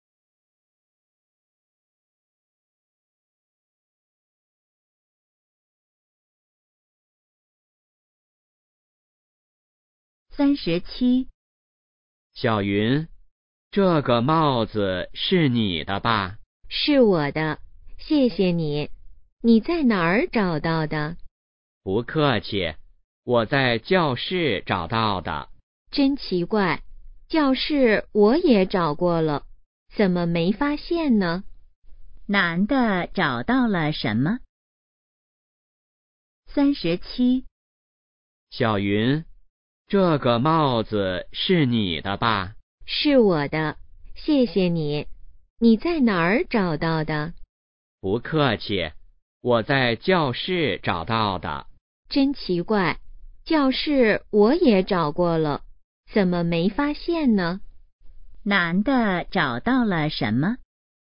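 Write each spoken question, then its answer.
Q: 男的找到了什么?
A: 帽子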